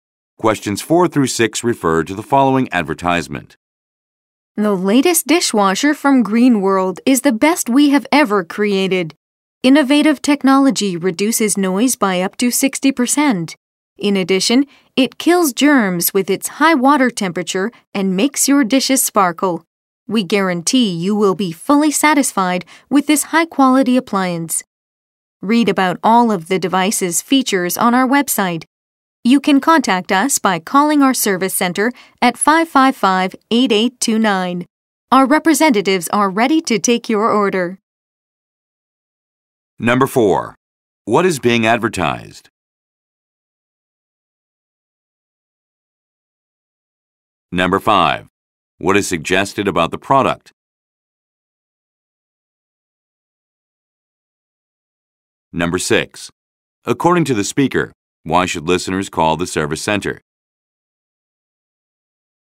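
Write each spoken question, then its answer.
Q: What is being advertised?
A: A dishwasher

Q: According to the speaker, why should listeners call the service center?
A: To place an order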